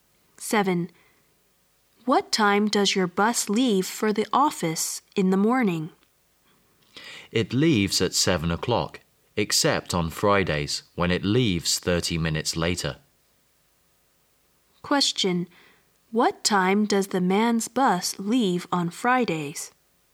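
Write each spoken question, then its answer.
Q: What time does the man's bus leave on Fridays?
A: At 7:30.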